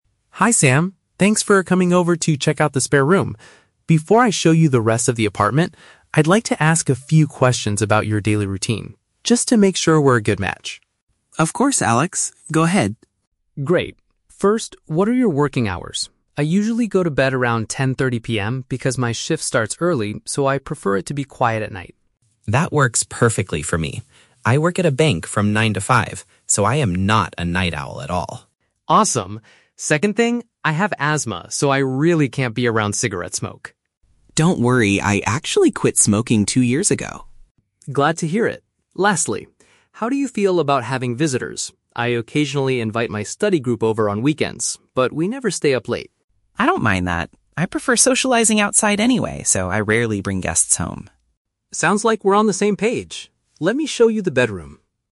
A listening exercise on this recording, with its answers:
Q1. Why does Alex want the apartment to be peaceful in the evening?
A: Because he needs to wake up early for his job.

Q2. What is Sam's current situation regarding smoking?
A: He stopped the habit a couple of years ago.

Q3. What is Alex's routine regarding bringing people to the apartment?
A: He sometimes has classmates over but they don't stay late.

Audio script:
Alex: Hi Sam, thanks for coming over to check out the spare room. Before I show you the rest of the apartment, I'd like to ask a few questions about your daily routine, just to make sure we're a good match.
Sam: Of course, Alex. Go ahead.
Alex: Great. First, what are your working hours? I usually go to bed around 10:30 PM because my shift starts early, so I prefer it to be quiet at night.
Sam: That works perfectly for me. I work at a bank from nine to five, so I am not a night owl at all.
Alex: Awesome. Second thing: I have asthma, so I really can't be around cigarette smoke.
Sam: Don't worry, I actually quit smoking two years ago.
Alex: Glad to hear it. Lastly, how do you feel about having visitors? I occasionally invite my study group over on weekends, but we never stay up late.
Sam: I don't mind that. I prefer socializing outside anyway, so I rarely bring guests home.